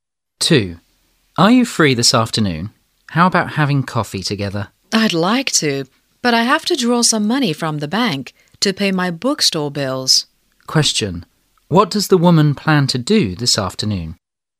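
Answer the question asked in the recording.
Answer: Draw money from the bank to pay her bookstore bills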